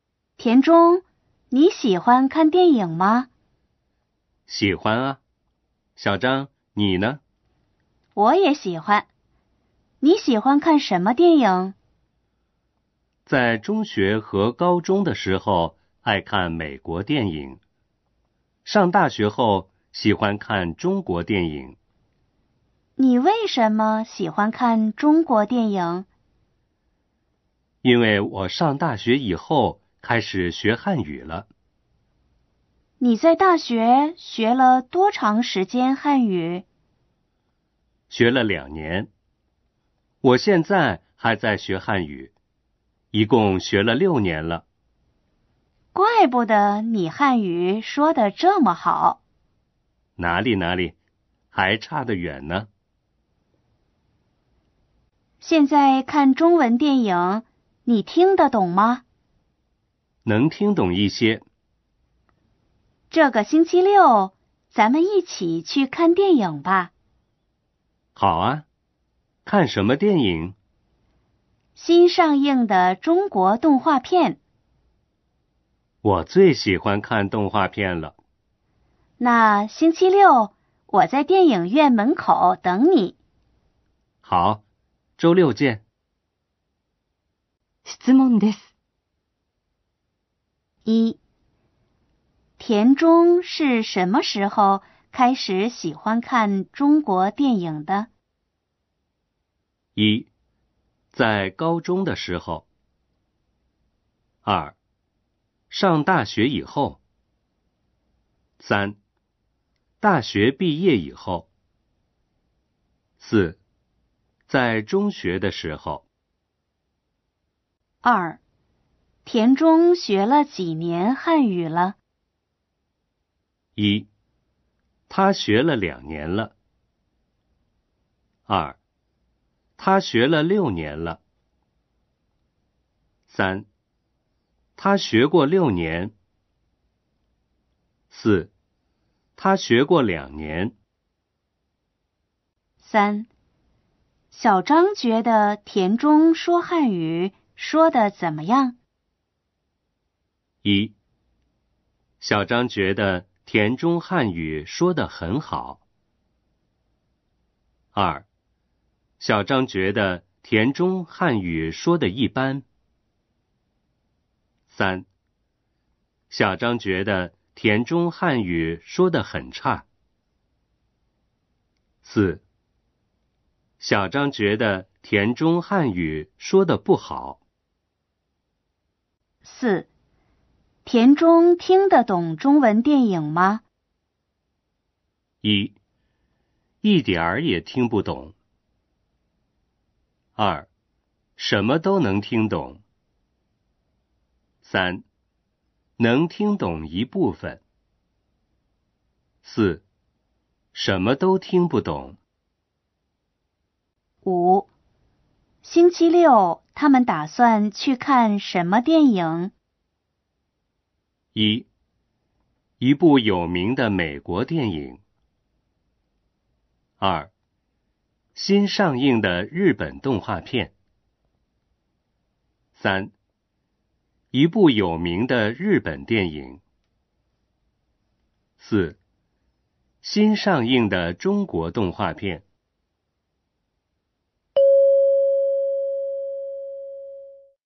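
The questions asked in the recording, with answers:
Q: 田中是什么时候开始喜欢看中国电影的?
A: 二: 上大学以后。

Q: 田中学了几年汉语了?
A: 二: 他学了六年了。

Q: 小张觉得田中说汉语说得怎么样?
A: 一: 小张觉得田中汉语说得很好。

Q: 田中听得懂中文电影吗?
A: 三: 能听懂一部分。

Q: 星期六他们打算去看什么电影?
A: 四: 新上映的中国动画片。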